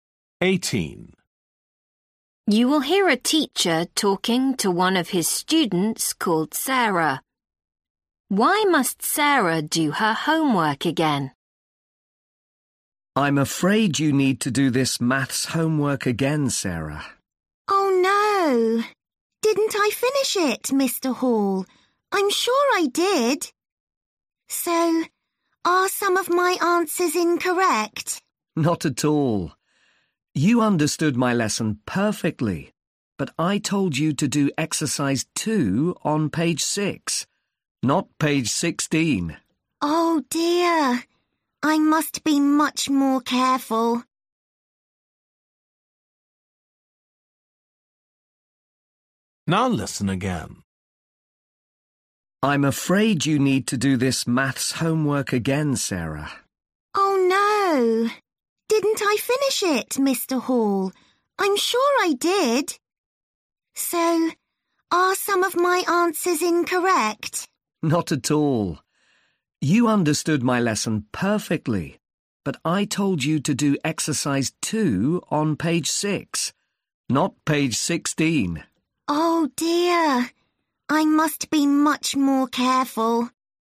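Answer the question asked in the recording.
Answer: She did the exercise on the wrong page (16 instead of 6)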